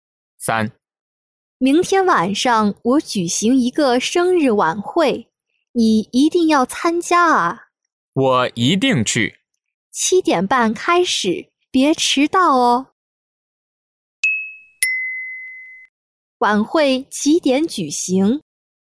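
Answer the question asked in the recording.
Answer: 七点半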